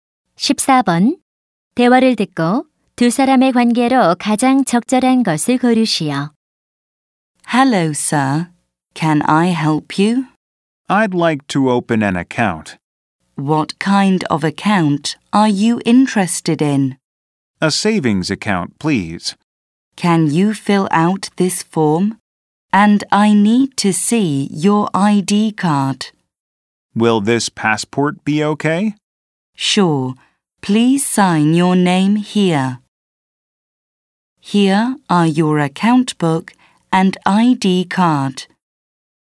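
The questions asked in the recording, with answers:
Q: 대화를 듣고 두 사람의 관계로 가장 적절한 것을 고르시오.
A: 은행원 - 고객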